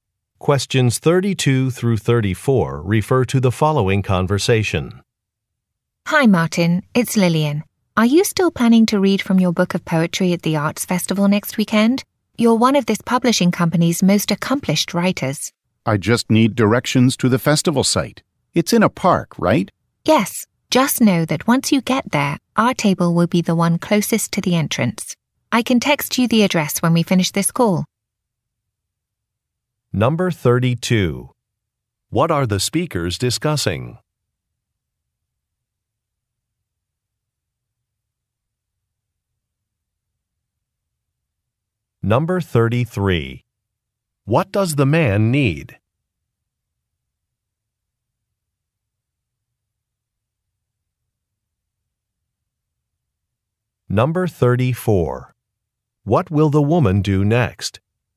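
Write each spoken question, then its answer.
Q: What are the speakers discussing?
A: The man reading from his poetry book at an arts festival

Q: What does the man need?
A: Directions to the festival site

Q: What will the woman do next?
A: Text him the address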